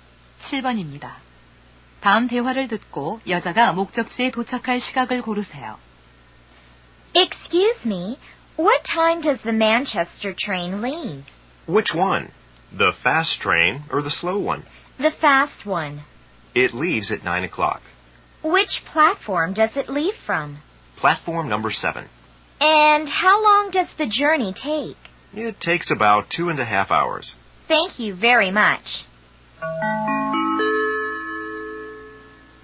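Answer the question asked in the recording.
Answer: 11시 30분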